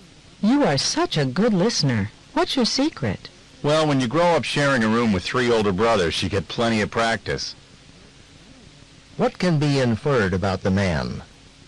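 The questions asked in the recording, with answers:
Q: What can be inferred about the man?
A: He has three older brothers and learned to listen by sharing a room with them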